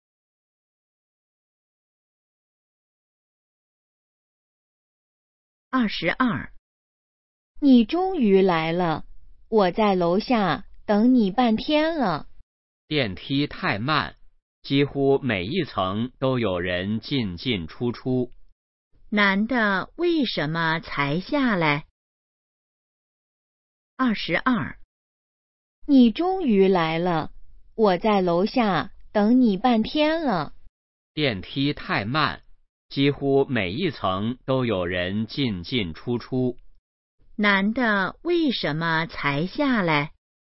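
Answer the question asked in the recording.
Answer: 电梯太慢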